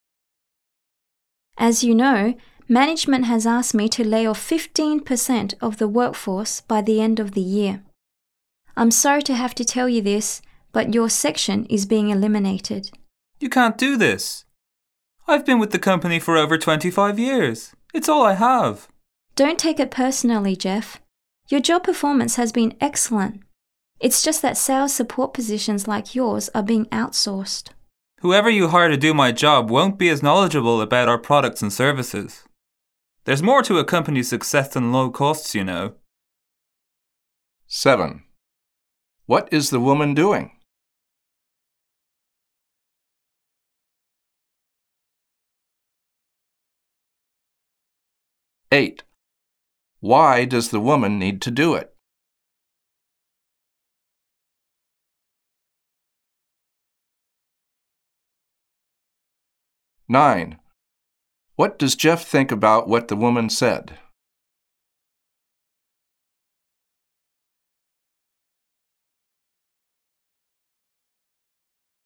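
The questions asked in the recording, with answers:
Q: What is the woman doing?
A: Telling Jeff that his section is being eliminated (laying him off)

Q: Why does the woman need to do it?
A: Management asked her to lay off 15% of the workforce; sales support jobs are being outsourced

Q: What does Jeff think about what the woman said?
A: He disagrees; his replacement won't know the products as well, and success is about more than low costs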